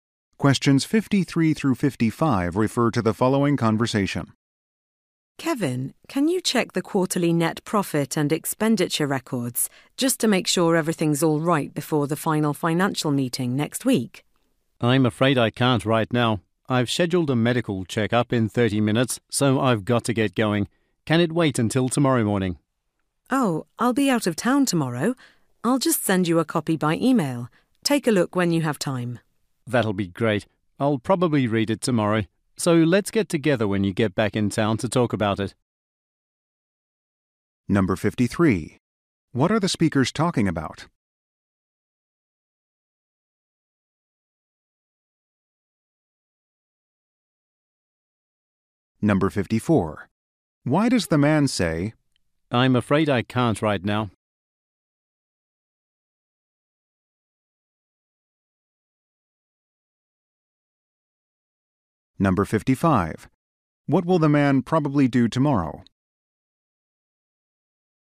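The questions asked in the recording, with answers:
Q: What are the speakers talking about?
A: Checking quarterly financial records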